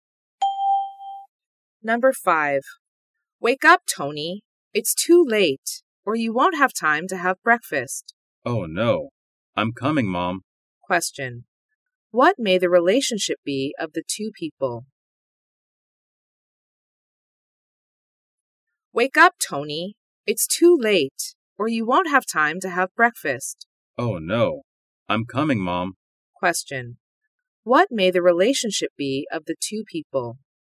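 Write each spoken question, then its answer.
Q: What may the relationship be of the two people?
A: Mother and son.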